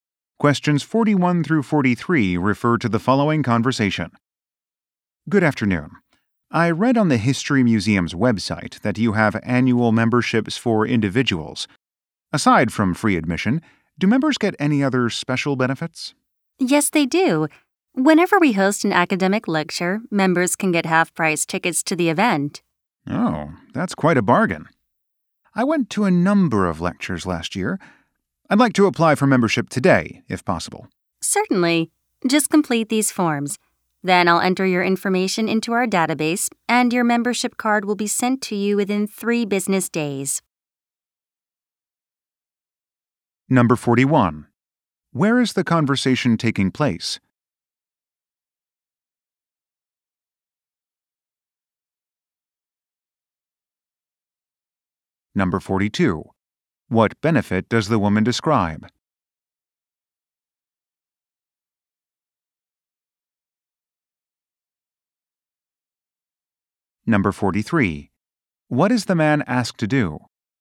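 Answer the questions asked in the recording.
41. At a history museum
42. Half-price tickets to academic lectures
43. Complete some forms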